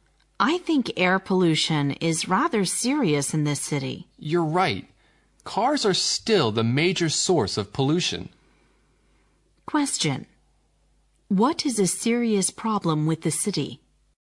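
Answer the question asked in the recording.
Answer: Air pollution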